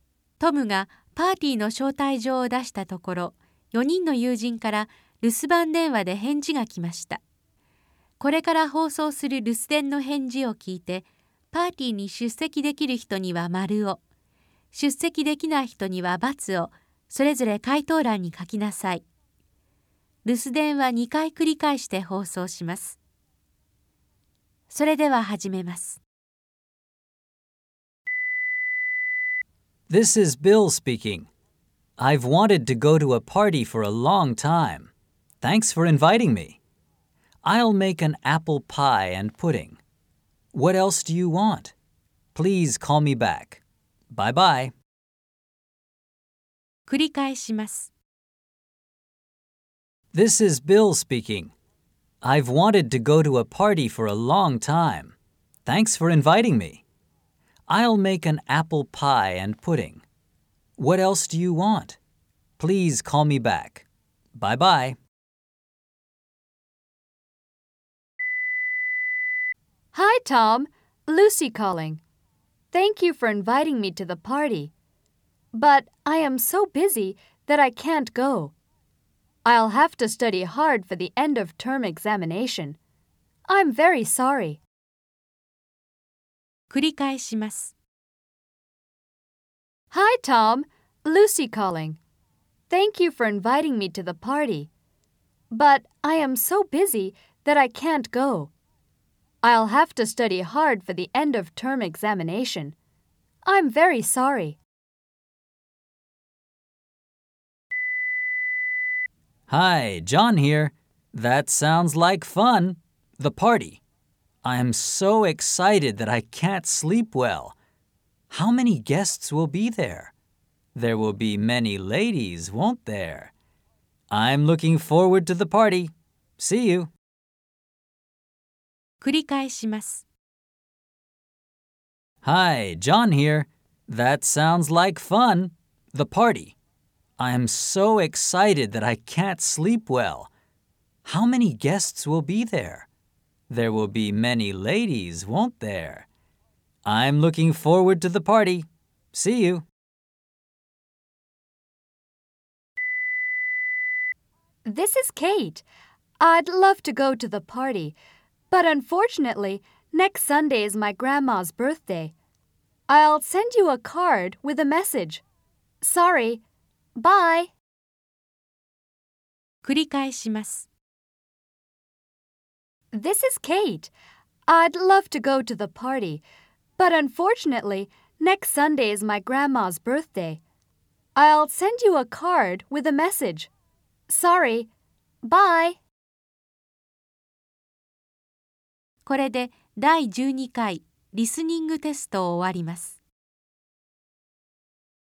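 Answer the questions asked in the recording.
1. ○(出席できる)
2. ×(出席できない)
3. ○(出席できる)
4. ×(出席できない)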